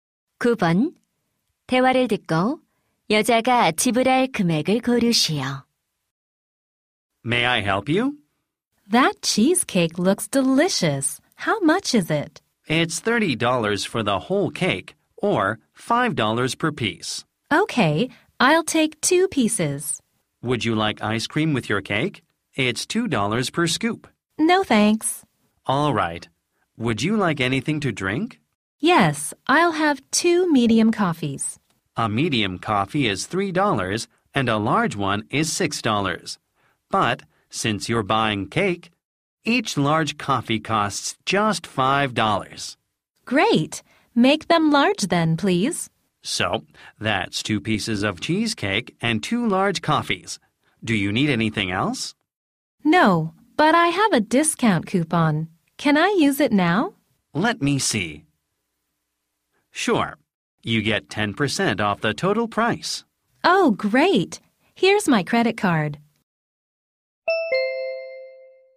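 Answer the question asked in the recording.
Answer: 18달러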